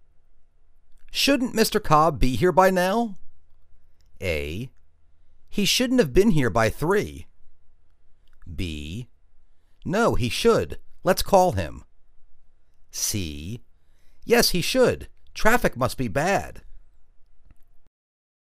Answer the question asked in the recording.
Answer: Yes, he should. Traffic must be bad.